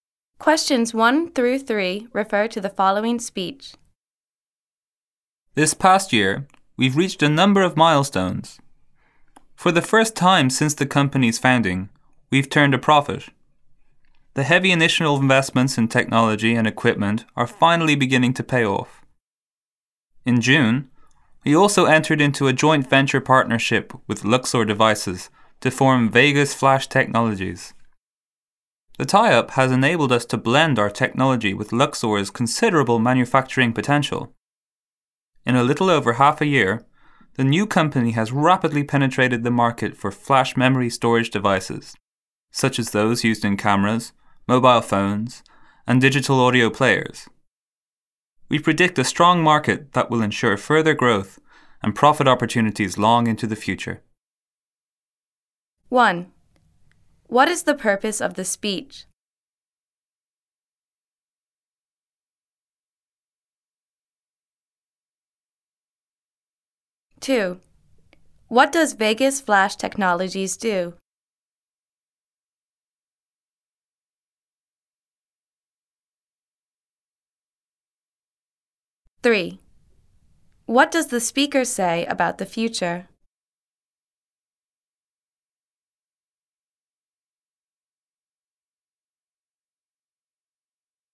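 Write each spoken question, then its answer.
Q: What does Vegas Flash Technologies do?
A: It makes flash memory storage devices

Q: What does the speaker say about the future?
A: A strong market will bring further growth and profit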